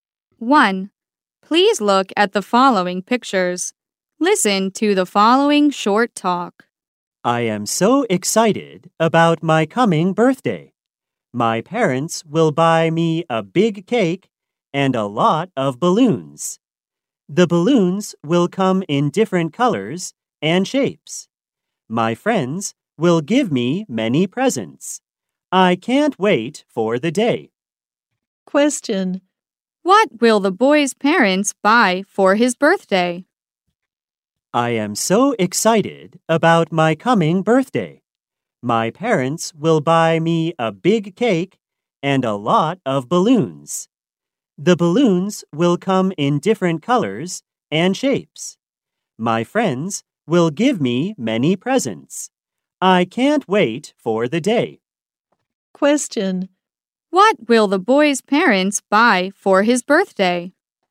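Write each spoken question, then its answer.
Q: What will the boy's parents buy for his birthday?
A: A big cake and a lot of balloons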